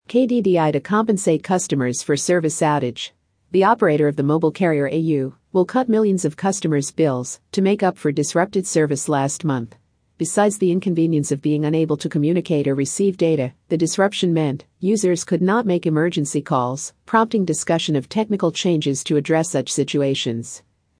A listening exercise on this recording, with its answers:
次の英文の音声を耳で聞こえた通りに書き取り、答案を自己採点してください。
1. ( ) "au" will cut millions of customers' bills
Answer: The operator of the mobile carrier

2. ( ) last month.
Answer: to make up for disrupted service

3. Besides the inconvenience of 3( ), the disruption meant users could not make emergency calls,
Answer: being unable to communicate or receive data

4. ( ) to address such situations.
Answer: prompting discussion of technical changes